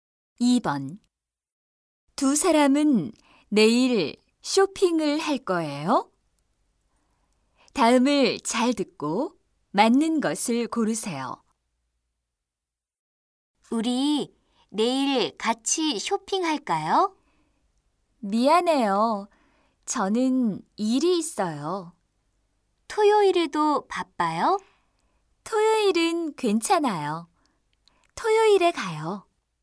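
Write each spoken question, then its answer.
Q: 두 사람은 내일 쇼핑을 할 거예요?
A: 아니요, 토요일에 해요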